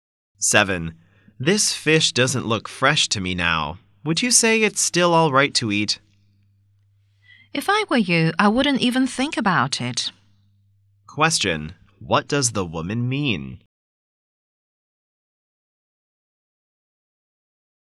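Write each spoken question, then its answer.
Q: What does the woman mean?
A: The fish should not be eaten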